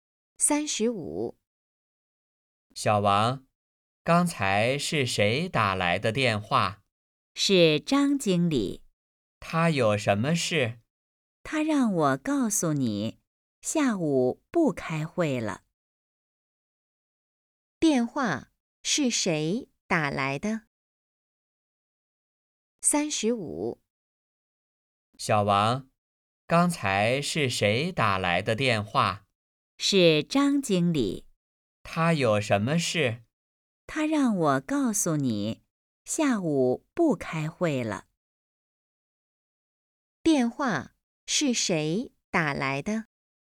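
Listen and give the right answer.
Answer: 张经理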